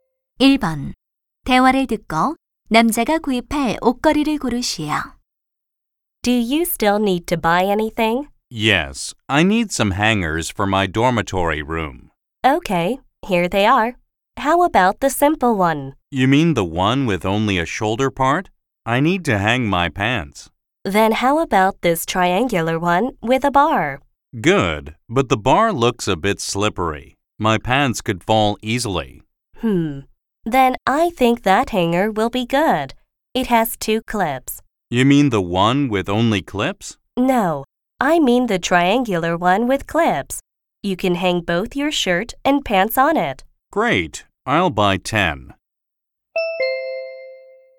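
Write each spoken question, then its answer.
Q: 대화를 듣고 남자가 구입할 옷걸이를 고르시오.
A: 집게가 두 개 달린 삼각형 옷걸이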